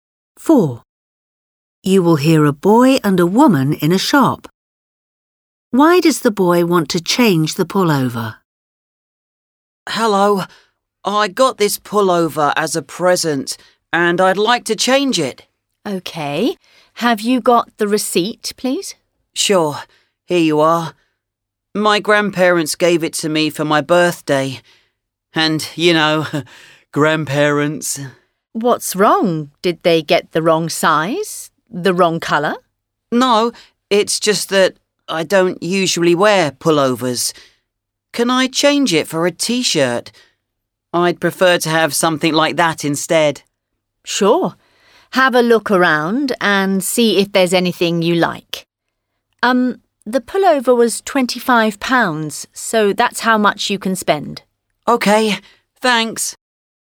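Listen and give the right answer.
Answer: He doesn't usually wear pullovers and would rather have a T-shirt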